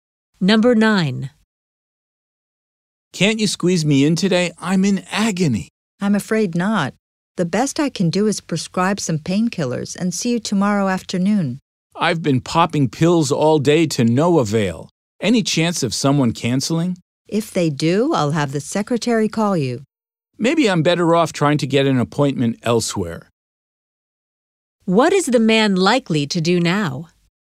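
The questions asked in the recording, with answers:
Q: What is the man likely to do now?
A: Try to get an appointment elsewhere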